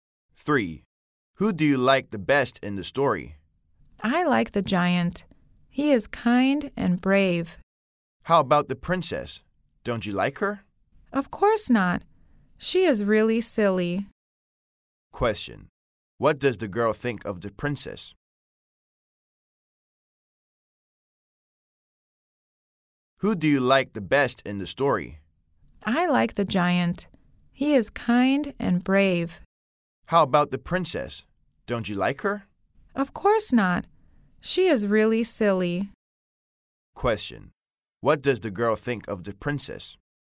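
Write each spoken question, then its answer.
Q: What does the girl think of the princess?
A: She is really silly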